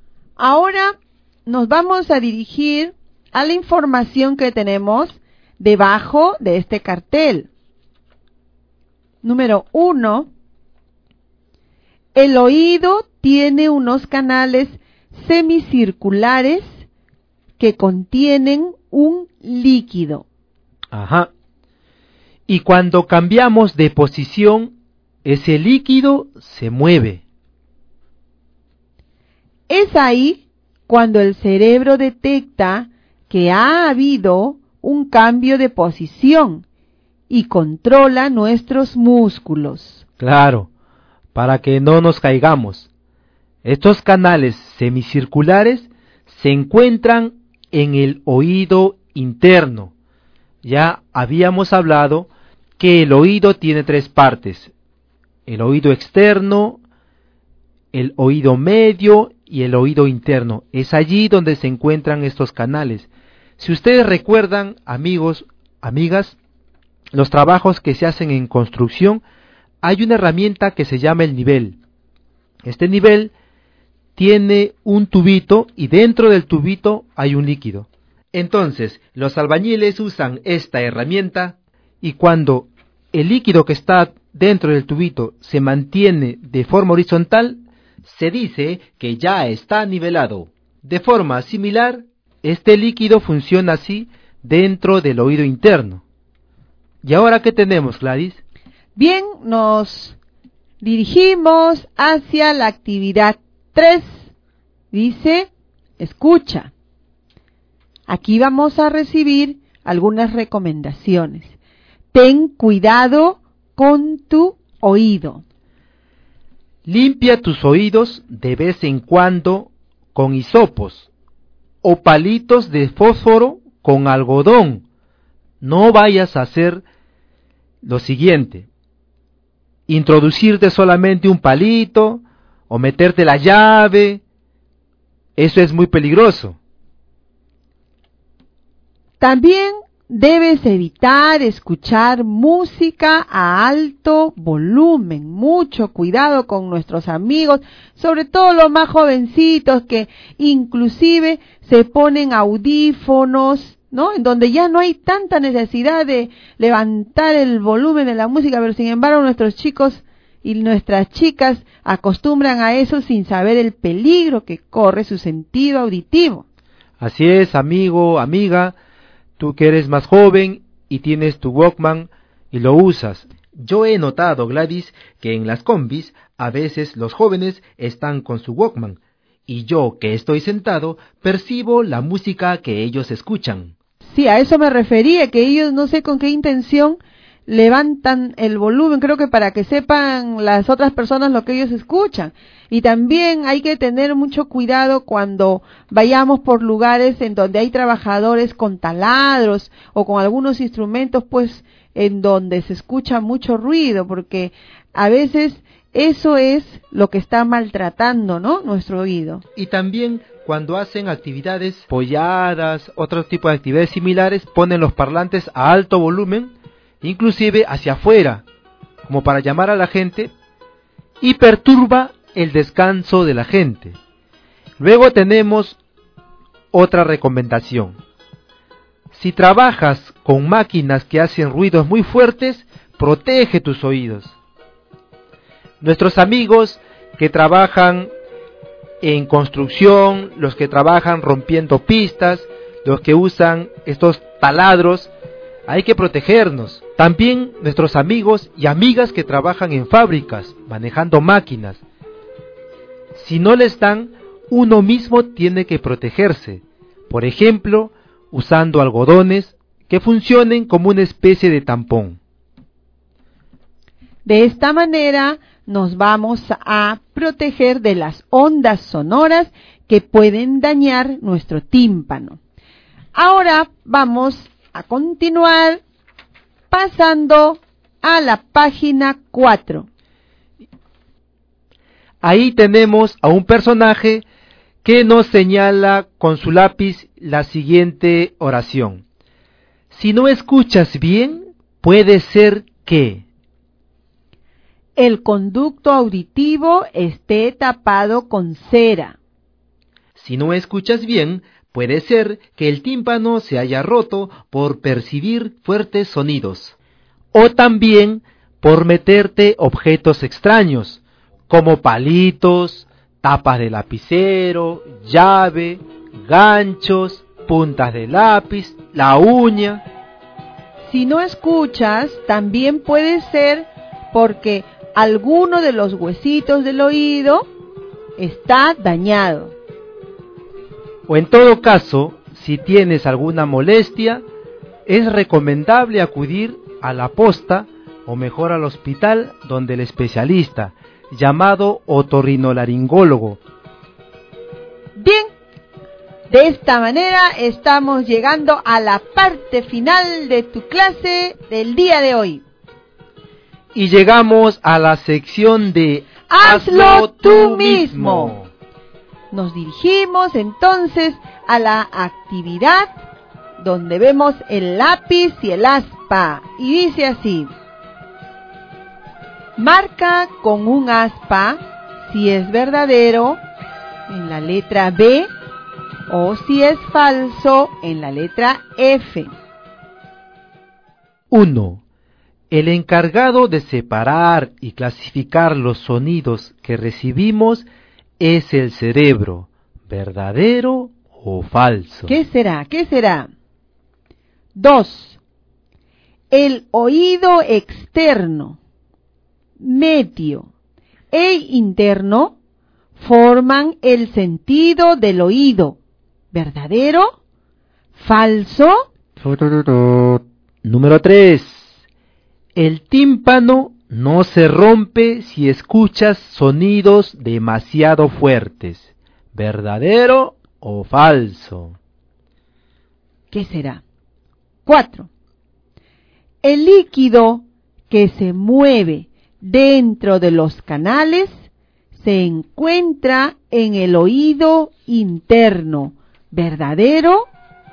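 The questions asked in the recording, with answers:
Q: El tímpano no se rompe si escuchas sonidos demasiado fuertes, ¿verdadero o falso?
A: Falso

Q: El líquido que se mueve dentro de los canales se encuentra en el oído interno, ¿verdadero?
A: Verdadero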